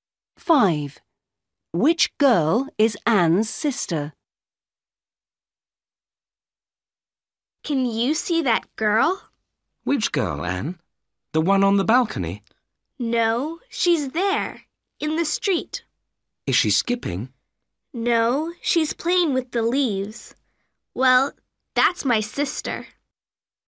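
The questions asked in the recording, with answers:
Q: Which girl is Anne's sister?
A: The girl in the street playing with the leaves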